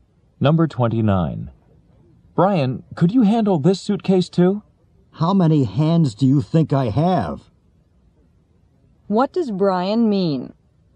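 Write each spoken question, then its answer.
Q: What does Brian mean?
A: He can't carry any more.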